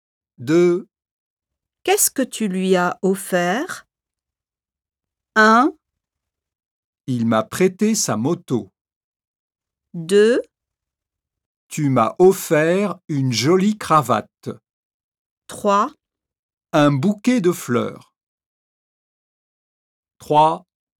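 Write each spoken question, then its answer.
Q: Qu'est-ce que tu lui as offert?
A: 3: Un bouquet de fleurs.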